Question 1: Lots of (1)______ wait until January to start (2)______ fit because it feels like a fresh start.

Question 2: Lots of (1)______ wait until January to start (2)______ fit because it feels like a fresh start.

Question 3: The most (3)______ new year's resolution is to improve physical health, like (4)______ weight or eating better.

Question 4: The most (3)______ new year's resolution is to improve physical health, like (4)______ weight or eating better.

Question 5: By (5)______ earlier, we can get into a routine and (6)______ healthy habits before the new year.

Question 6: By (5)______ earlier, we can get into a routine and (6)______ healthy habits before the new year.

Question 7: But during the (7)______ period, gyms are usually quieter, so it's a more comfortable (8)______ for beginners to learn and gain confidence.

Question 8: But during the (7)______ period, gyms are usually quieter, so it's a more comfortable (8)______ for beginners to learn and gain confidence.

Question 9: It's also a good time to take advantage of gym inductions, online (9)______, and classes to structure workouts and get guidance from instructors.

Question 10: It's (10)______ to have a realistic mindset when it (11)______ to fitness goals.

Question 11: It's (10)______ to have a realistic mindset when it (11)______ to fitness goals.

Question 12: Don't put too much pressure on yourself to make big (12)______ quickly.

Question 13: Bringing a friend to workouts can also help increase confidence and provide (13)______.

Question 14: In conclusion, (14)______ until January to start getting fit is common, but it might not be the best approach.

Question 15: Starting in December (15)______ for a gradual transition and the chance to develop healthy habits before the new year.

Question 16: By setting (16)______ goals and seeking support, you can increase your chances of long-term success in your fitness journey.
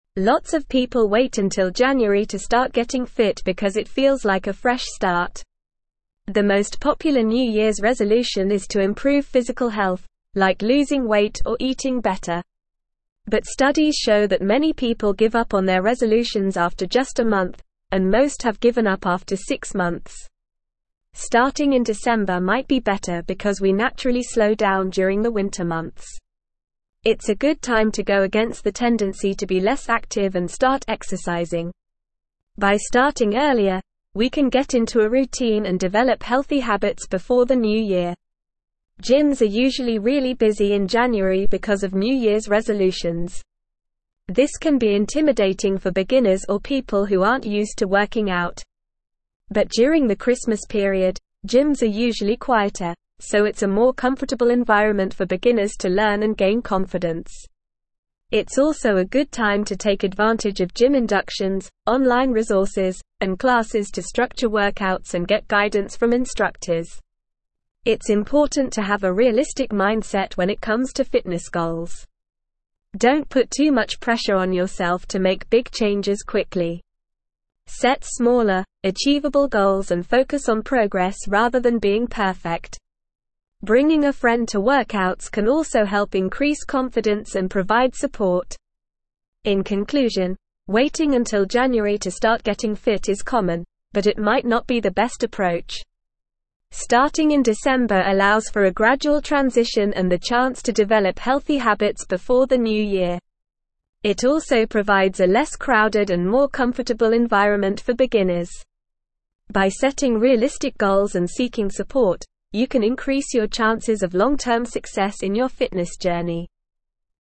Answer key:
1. people
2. getting
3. popular
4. losing
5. starting
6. develop
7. Christmas
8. environment
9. resources
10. important
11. comes
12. changes
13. support
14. waiting
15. allows
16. realistic

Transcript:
Lots of people wait until January to start getting fit because it feels like a fresh start. The most popular new year's resolution is to improve physical health, like losing weight or eating better. But studies show that many people give up on their resolutions after just a month, and most have given up after six months.
Starting in December might be better because we naturally slow down during the winter months. It's a good time to go against the tendency to be less active and start exercising. By starting earlier, we can get into a routine and develop healthy habits before the new year.
Gyms are usually really busy in January because of new year's resolutions. This can be intimidating for beginners or people who aren't used to working out. But during the Christmas period, gyms are usually quieter, so it's a more comfortable environment for beginners to learn and gain confidence. It's also a good time to take advantage of gym inductions, online resources, and classes to structure workouts and get guidance from instructors.
It's important to have a realistic mindset when it comes to fitness goals. Don't put too much pressure on yourself to make big changes quickly. Set smaller, achievable goals and focus on progress rather than being perfect. Bringing a friend to workouts can also help increase confidence and provide support.
In conclusion, waiting until January to start getting fit is common, but it might not be the best approach. Starting in December allows for a gradual transition and the chance to develop healthy habits before the new year. It also provides a less crowded and more comfortable environment for beginners. By setting realistic goals and seeking support, you can increase your chances of long-term success in your fitness journey.

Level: Level 3